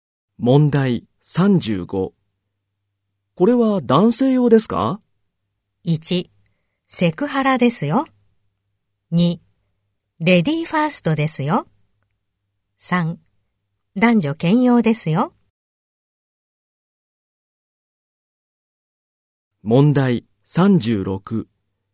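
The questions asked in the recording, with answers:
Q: これは男性用ですか?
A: 3: 男女兼用ですよ。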